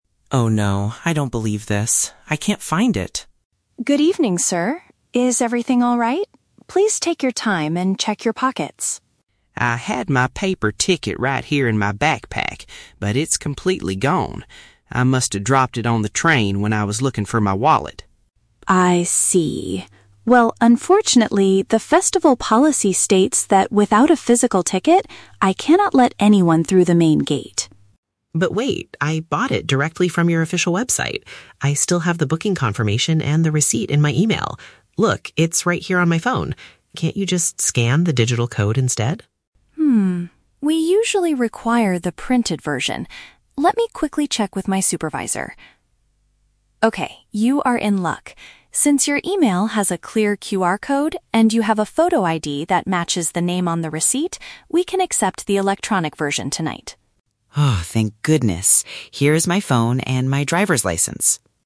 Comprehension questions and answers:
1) What is the man's main problem at the beginning of the conversation?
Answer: He has misplaced his physical pass for the event.

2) What does the man suggest to solve the issue?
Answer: Showing the electronic proof of purchase on his device.

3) Why does the ticket inspector finally allow the man to enter?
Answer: Because he is able to provide personal identification that matches the online record.

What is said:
Attendee: Oh no, I don't believe this. I can't find it!
Ticket Inspector: Good evening, sir. Is everything alright? Please take your time and check your pockets.
Attendee: I had my paper ticket right here in my backpack, but it's completely gone. I must have dropped it on the train when I was looking for my wallet.
Ticket Inspector: I see. Well, unfortunately, the festival policy states that without a physical ticket, I cannot let anyone through the main gate.
Attendee: But wait! I bought it directly from your official website. I still have the booking confirmation and the receipt in my email. Look, it's right here on my phone. Can't you just scan the digital code instead?
Ticket Inspector: Hmm, we usually require the printed version. Let me quickly check with my supervisor. (Pause) Okay, you are in luck. Since your email has a clear QR code and you have a photo ID that matches the name on the receipt, we can accept the electronic version tonight.